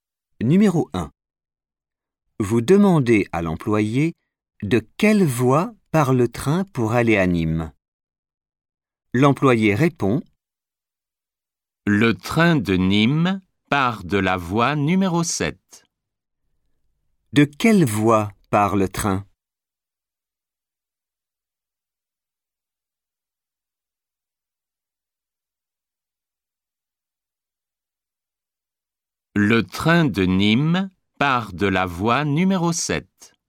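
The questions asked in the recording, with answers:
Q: De quelle voie part le train ?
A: Voie numéro 7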